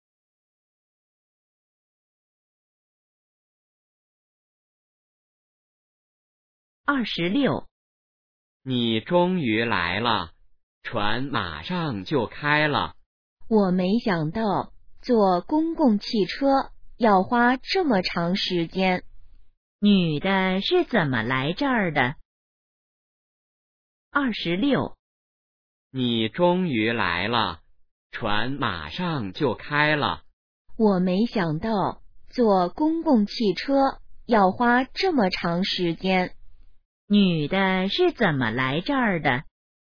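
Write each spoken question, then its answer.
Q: 女的是怎么来这儿的?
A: 坐公共汽车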